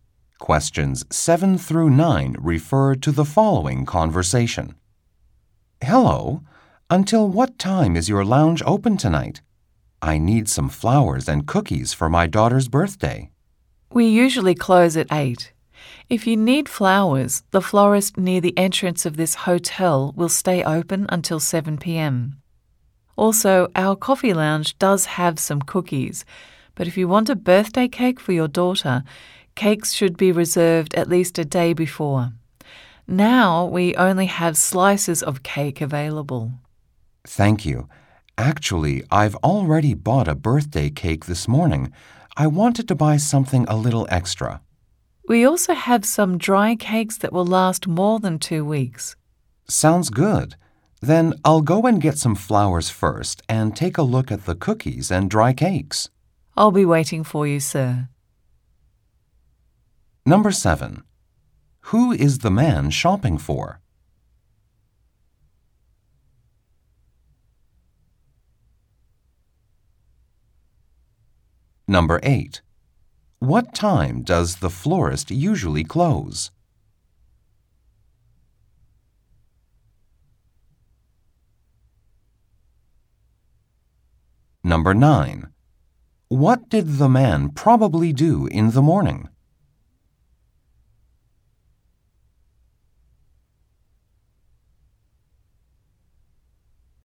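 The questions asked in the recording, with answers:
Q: Who is the man shopping for?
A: His daughter

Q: What time does the florist usually close?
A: At 7 p.m.

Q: What did the man probably do in the morning?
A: He bought a birthday cake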